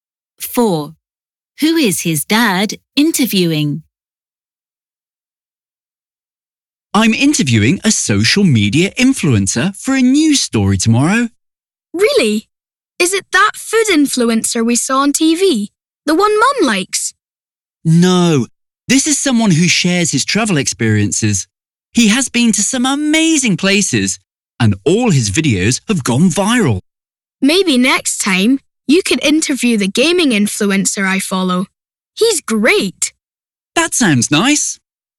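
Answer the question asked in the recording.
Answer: A travel influencer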